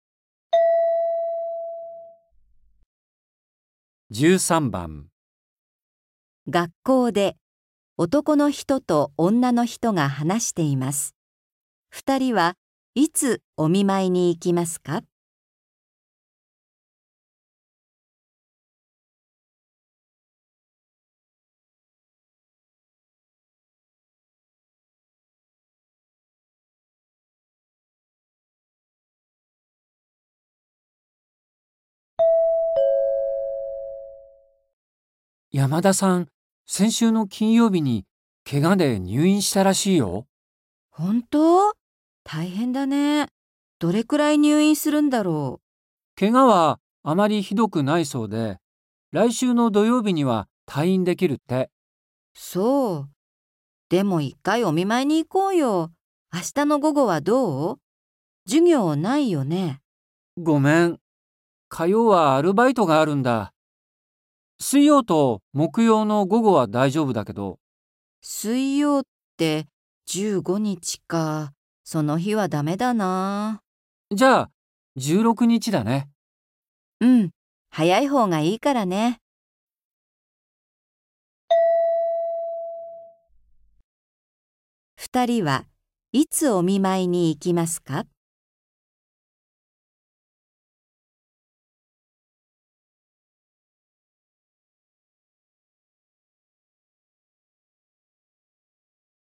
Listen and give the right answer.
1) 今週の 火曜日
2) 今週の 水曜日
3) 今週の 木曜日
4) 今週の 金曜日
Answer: 3) 今週の 木曜日

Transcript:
M:山田さん、先週の金曜日にけがで入院したらしいよ。
F:本当!?大変だね。どれくらい入院するんだろう。
M:けがはあまりひどくないそうで、来週の土曜日には退院できるって。
F:そう。でも、一回お見舞いに行こうよ。明日の午後はどう?授業、ないよね。
M:ごめん。火曜はアルバイトがあるんだ。水曜と木曜の午後は大丈夫だけど。

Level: 初級